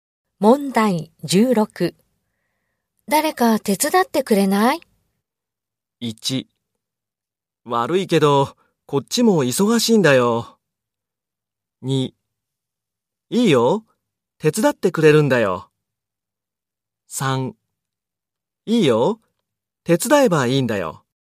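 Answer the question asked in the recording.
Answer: 1: 悪いけど、こっちも忙しいんだよ。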